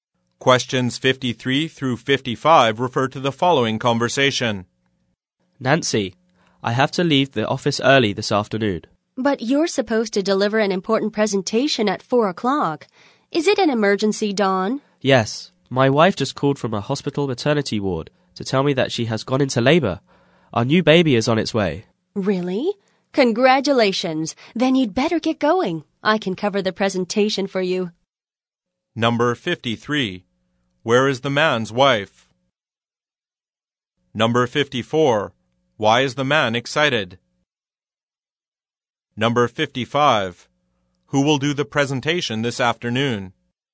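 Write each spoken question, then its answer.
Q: Where is the man's wife?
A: In a hospital maternity ward

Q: Why is the man excited?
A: His wife has gone into labor; their new baby is coming

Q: Who will do the presentation this afternoon?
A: Nancy (the woman)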